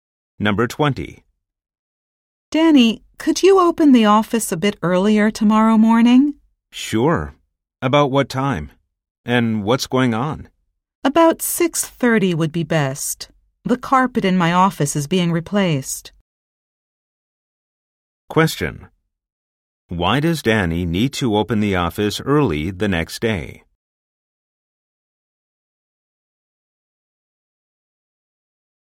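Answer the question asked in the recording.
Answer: The carpet in the office is being replaced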